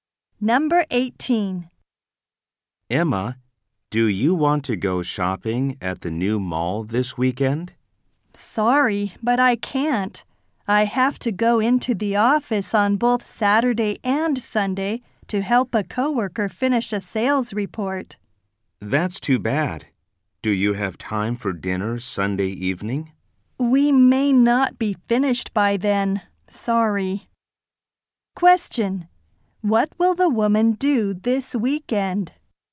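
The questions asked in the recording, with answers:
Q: What will the woman do this weekend?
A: Go to the office to help a coworker finish a sales report.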